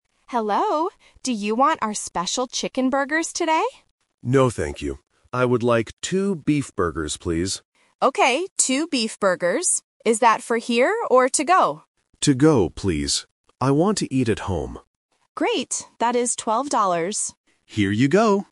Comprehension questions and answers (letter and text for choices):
Listen to the conversation between a cashier and a customer. Choose the correct answer (A, B, or C).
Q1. What food does the customer buy?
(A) Chicken burgers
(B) Beef burgers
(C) Hot dogs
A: (B) Beef burgers

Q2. Where will the customer eat the food?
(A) At home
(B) In the restaurant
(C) In the park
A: (A) At home

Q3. How much is the food?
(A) $20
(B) $2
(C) $12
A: (C) $12

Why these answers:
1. The customer clearly says, "I would like two beef burgers, please."
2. The customer chooses "To go, please" and adds, "I want to eat at home."
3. The cashier says, "That is 12 dollars."